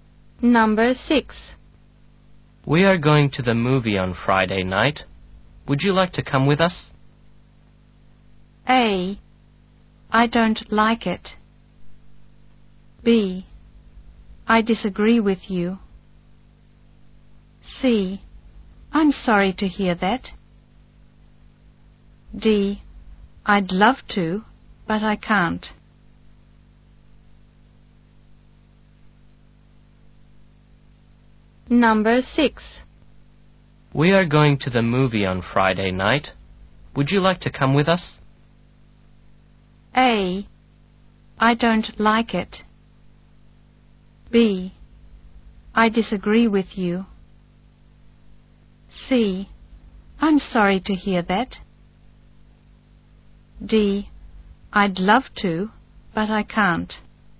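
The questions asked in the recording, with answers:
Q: "We are going to the movie on Friday night.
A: D: I'd love to, but I can't.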